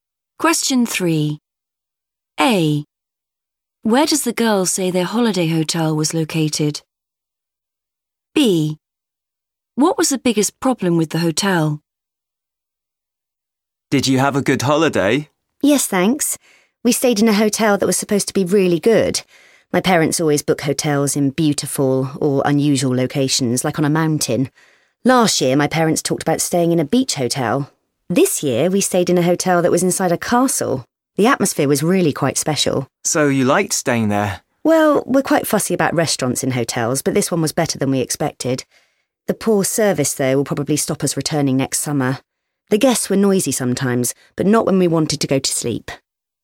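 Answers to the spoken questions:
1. inside a castle
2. the poor service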